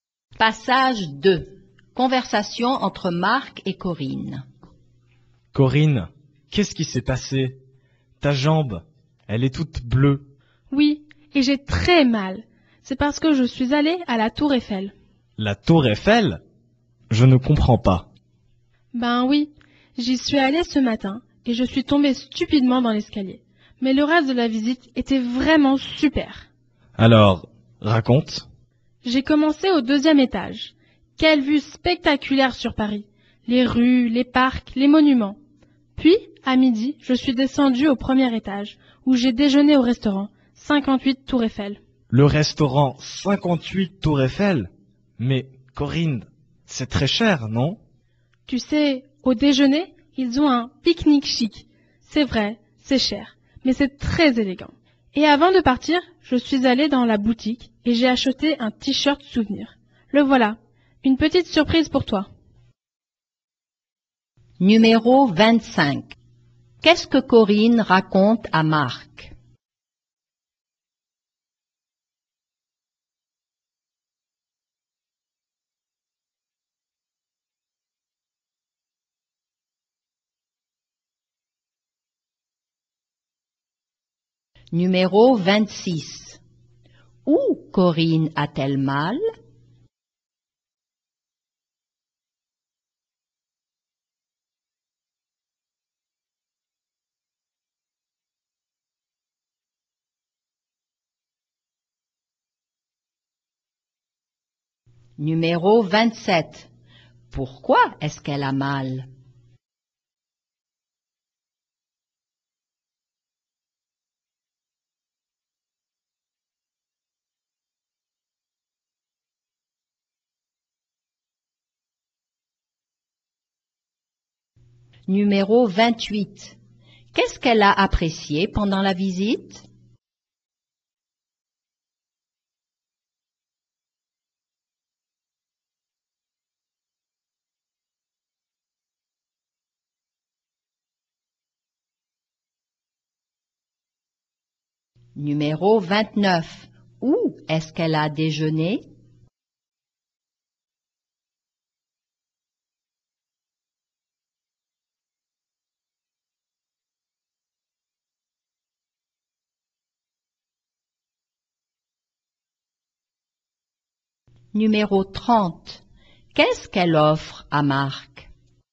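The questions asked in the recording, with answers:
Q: Qu'est-ce que Corinne raconte à Marc?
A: Sa visite à la Tour Eiffel

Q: Où Corinne a-t-elle mal?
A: À la jambe

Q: Pourquoi est-ce qu'elle a mal?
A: Elle est tombée dans l'escalier

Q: Qu'est-ce qu'elle a apprécié pendant la visite?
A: La vue sur Paris

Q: Où est-ce qu'elle a déjeuné?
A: Au restaurant 58 Tour Eiffel, au premier étage

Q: Qu'est-ce qu'elle offre à Marc?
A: Un t-shirt souvenir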